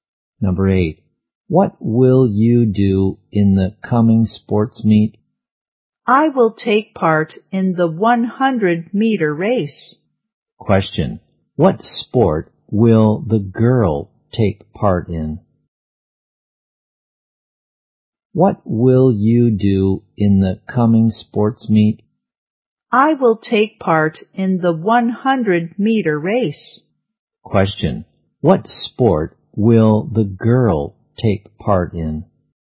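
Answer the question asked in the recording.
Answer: The 100-meter race.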